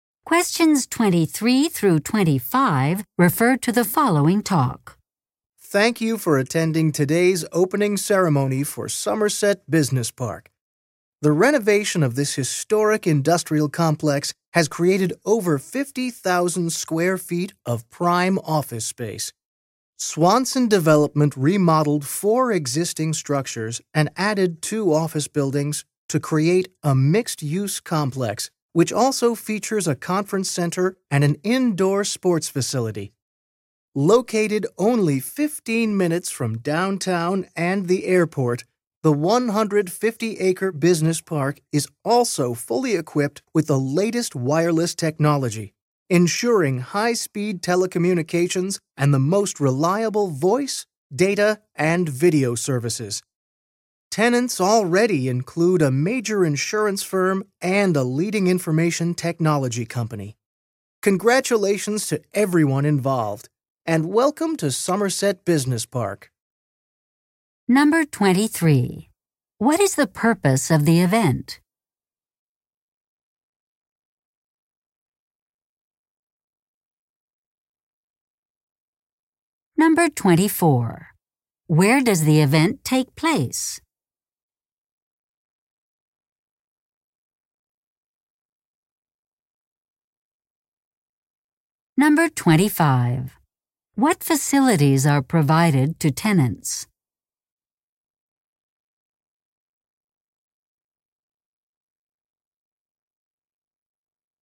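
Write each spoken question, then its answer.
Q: What is the purpose of the event?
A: To celebrate the opening of Somerset Business Park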